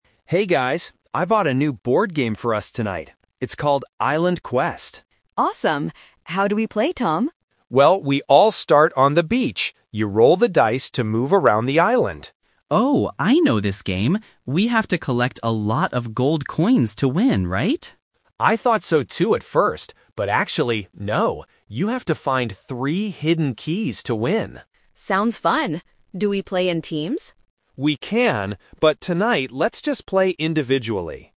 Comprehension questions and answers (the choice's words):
Listen to three friends talking about a new board game. Choose the correct answer (A, B, or C).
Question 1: What does a player use to move around the board?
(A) Cards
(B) Dice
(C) Keys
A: Dice

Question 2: What do players need to do to win the game?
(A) Collect gold coins.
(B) Reach the beach first.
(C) Find the hidden keys.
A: Find the hidden keys.

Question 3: How are they going to play the game tonight?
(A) In teams.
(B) Individually.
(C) With another group.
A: Individually.

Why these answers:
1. Tom clearly says: "You roll the dice to move around the island."
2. Tom corrects Ben and says: "You have to find three hidden keys to win."
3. Lily asks if they play in teams, and Tom answers: "...but tonight let's just play individually."

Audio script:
Tom: Hey guys, I bought a new board game for us tonight. It's called "Island Quest".
Lily: Awesome! How do we play, Tom?
Tom: Well, we all start on the beach. You roll the dice to move around the island.
Ben: Oh, I know this game! We have to collect a lot of gold coins to win, right?
Tom: I thought so too at first, but actually, no. You have to find three hidden keys to win.
Lily: Sounds fun! Do we play in teams?

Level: A2